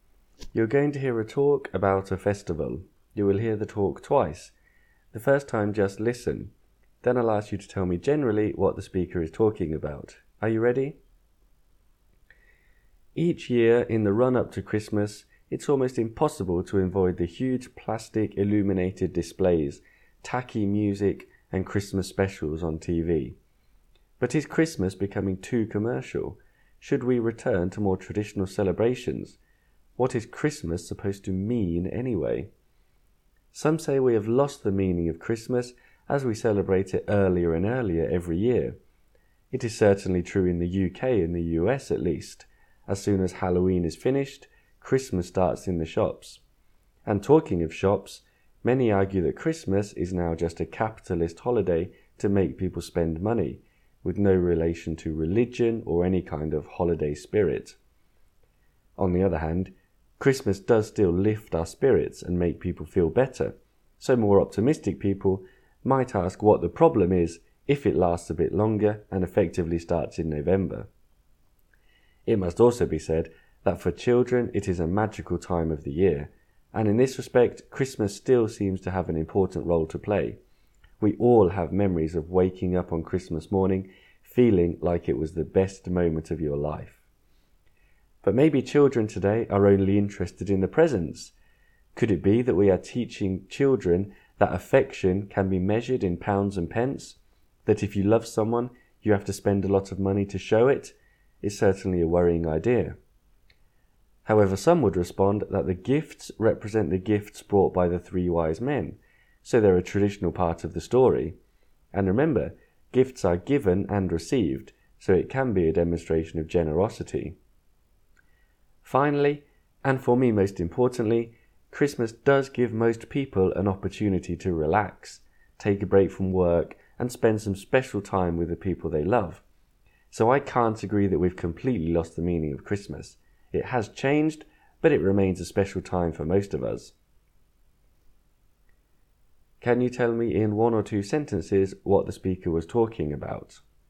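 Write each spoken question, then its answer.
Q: Can you tell me in one or two sentences what the speaker was talking about?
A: Whether Christmas has become too commercial and whether we have lost its meaning; the speaker thinks it has changed but is still special.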